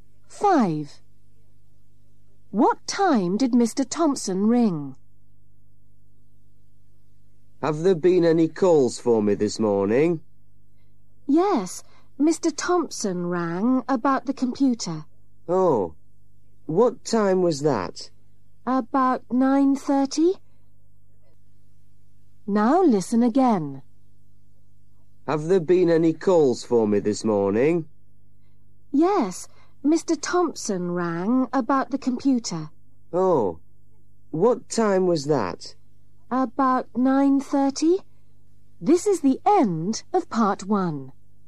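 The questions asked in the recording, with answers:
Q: What time did Mr. Thompson ring?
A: About 9:30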